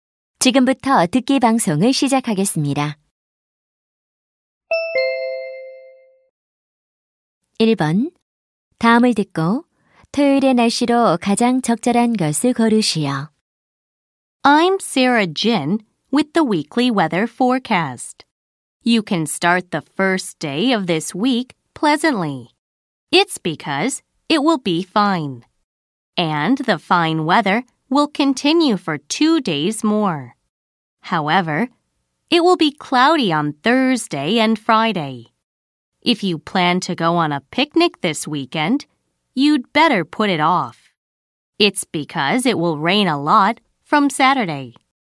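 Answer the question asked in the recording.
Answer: 비가 많이 옴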